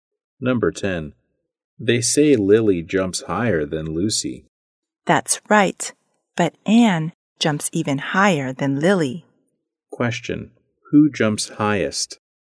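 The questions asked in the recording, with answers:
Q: who jumps highest?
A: Anne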